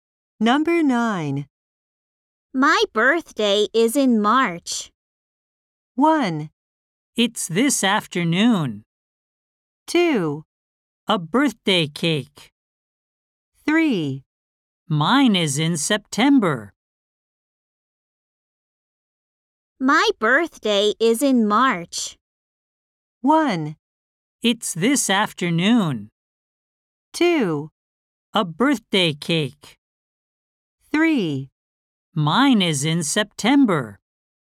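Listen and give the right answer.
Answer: 3: Mine is in September.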